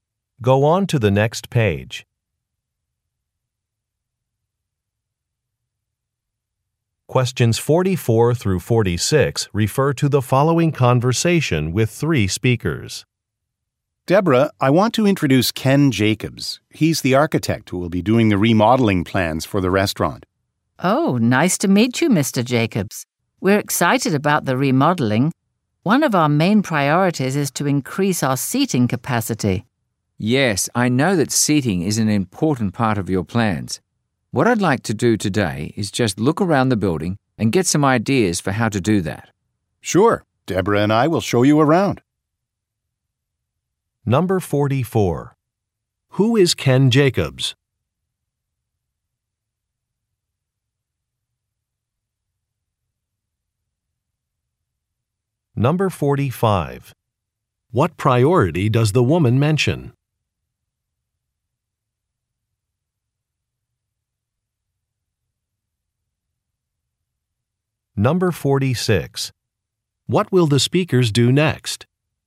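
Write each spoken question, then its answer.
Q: Who is Ken Jacobs?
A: An architect

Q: What priority does the woman mention?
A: Increasing seating capacity

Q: What will the speakers do next?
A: Look around the building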